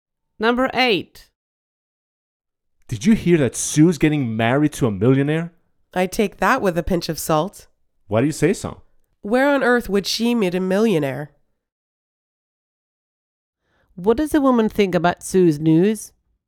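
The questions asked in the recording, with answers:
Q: What does a woman think about Sue's news?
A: She doubts it is true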